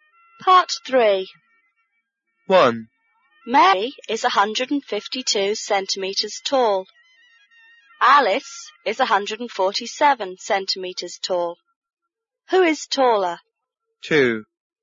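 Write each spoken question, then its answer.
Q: Who is taller?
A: Mary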